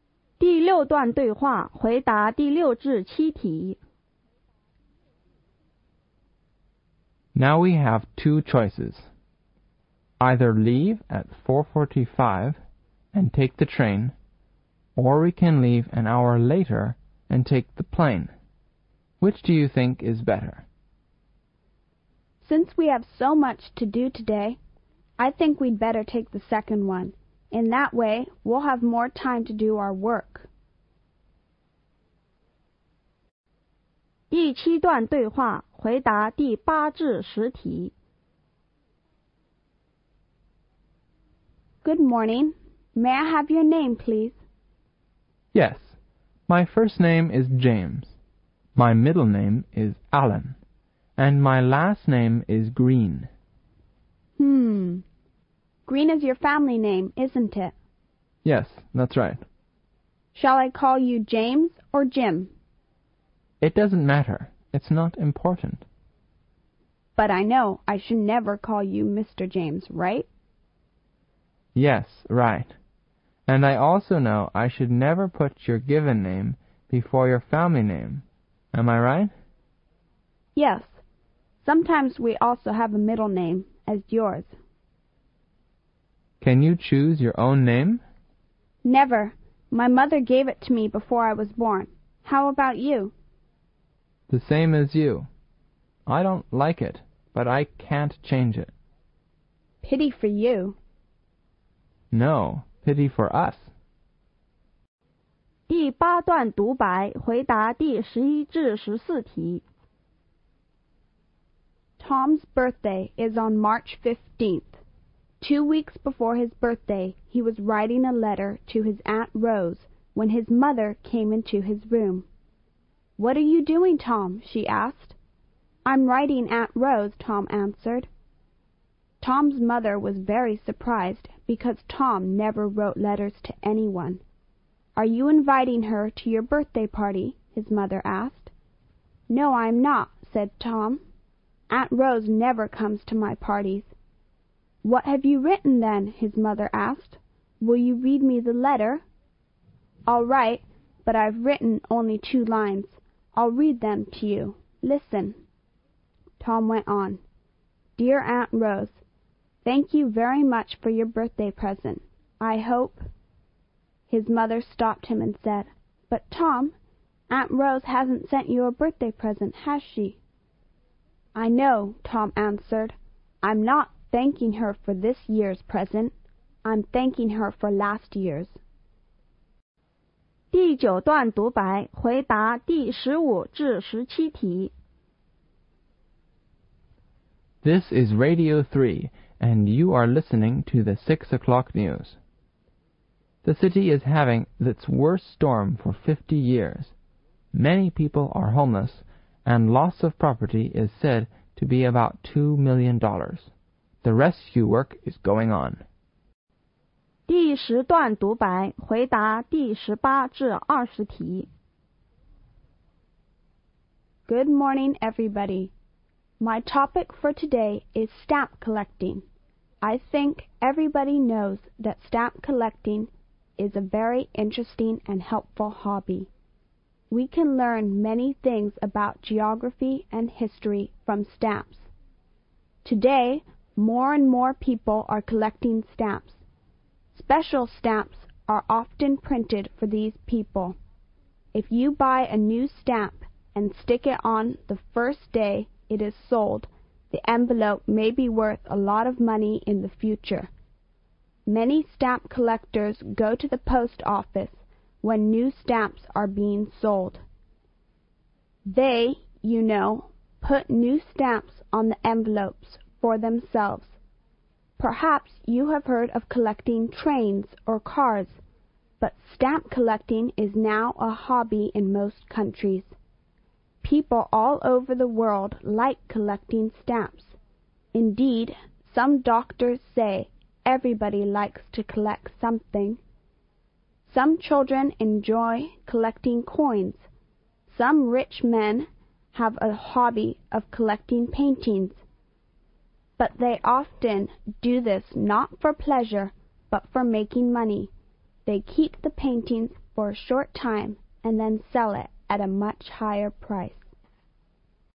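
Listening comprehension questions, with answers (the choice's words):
第二节:听下面若干对话和独白。每段对话和独白后有几个小题。从题中列出的A,B,C选项中选出最佳的选项。每段对话或独白听两遍。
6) When should the speakers leave if they want to take the train?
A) At 4:15.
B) At 5:45.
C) At 4:45.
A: At 4:45.

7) What will the two speakers probably do an hour later?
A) They will have to do their work.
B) They will have to take the train.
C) They will have to take the plane.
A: They will have to take the plane.

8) What's the boy's full name?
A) Jane Green Allan.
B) James Allan.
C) James Allan Green.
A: James Allan Green.

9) What can we call the boy for short?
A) Jim.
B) Green.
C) Mr.Green.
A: Jim.

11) When did Tom write a letter to his aunt?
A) On March 1st.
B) At the end of March.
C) On Tom's Birthday.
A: On March 1st.

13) Why wasn't Tom inviting his aunt to his birthday party?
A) Because Tom didn't like his Aunt Rose very much.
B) Because his Aunt Rose didn't like Tom very much.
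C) Because his aunt had never take part in Tom's birthday parties.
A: Because his aunt had never take part in Tom's birthday parties.

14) Why did Tom thank his aunt?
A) Because his aunt sent him a birthday present last year.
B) Because his aunt would come to his birthday party.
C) His aunt wrote a letter to him on his birthday.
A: Because his aunt sent him a birthday present last year.

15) What is happening in the city?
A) An earthquake.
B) A flood.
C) A big storm.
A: A big storm.

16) What is the result of the disaster?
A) Many houses were damaged.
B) Many people were killed.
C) Many houses were broken into.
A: Many houses were damaged.

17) Where is the news from?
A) Radio Free.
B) Radio Three.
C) Radio Two.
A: Radio Three.

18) To whom do the stamp collectors post the envelope on which they have put the new stamp?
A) Their friends.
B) Doctors.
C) Themselves.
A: Themselves.

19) Which of the following is the most popular hobby in most countries?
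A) Stamp collecting.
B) Train collecting.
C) Car collecting.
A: Stamp collecting.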